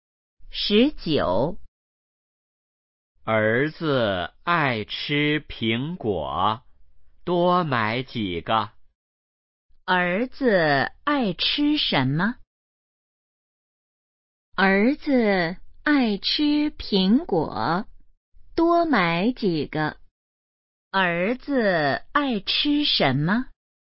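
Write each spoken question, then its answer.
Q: 儿子爱吃什么?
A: 苹果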